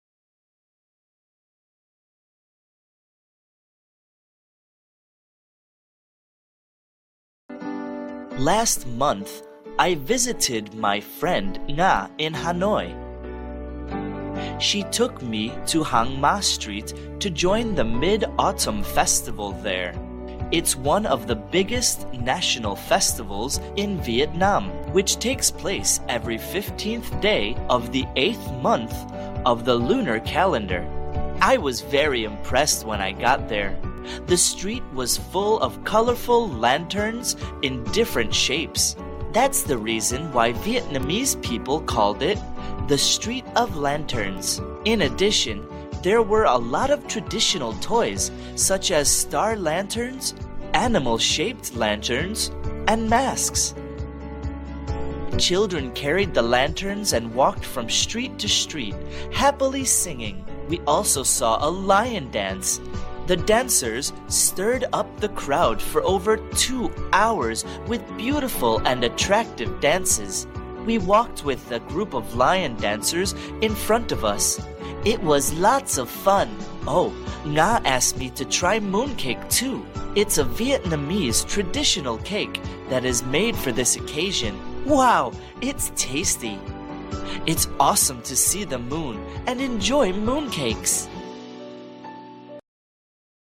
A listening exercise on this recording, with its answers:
Task: Answer the questions briefly.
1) Where did the narrator join the Mid-Autumn Festival?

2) What were children carrying during the festival?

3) What traditional cake is made for this occasion?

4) How did the narrator feel about the festival?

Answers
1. Hang Ma Street (Hanoi)
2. Lanterns
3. Moon cake
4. He was impressed / found it awesome

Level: lớp 7